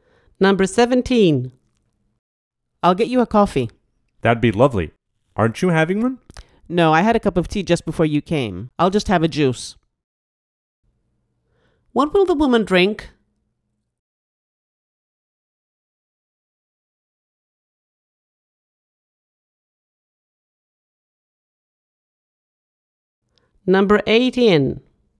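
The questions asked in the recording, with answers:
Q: What will the woman drink?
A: Coffee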